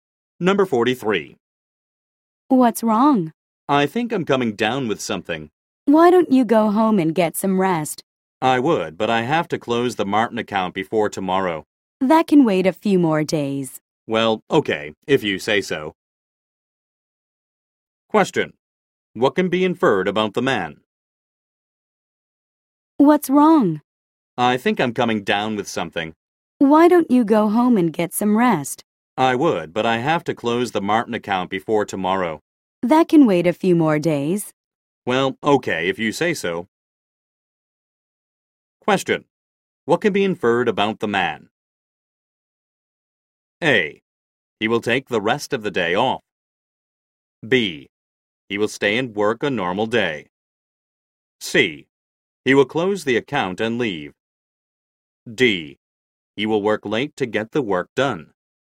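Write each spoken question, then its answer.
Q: What can be inferred about the man?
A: A: He will take the rest of the day off.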